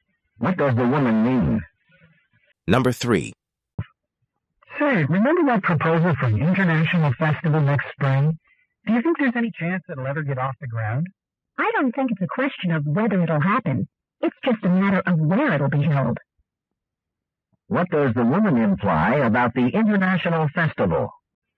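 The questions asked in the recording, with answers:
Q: What does the woman imply about the international festival?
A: It will surely take place; only the location is undecided.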